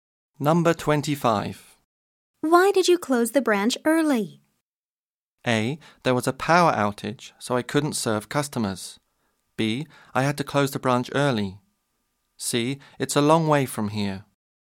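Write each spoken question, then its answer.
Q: Why did you close the branch early?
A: A: There was a power outage, so I couldn't serve customers.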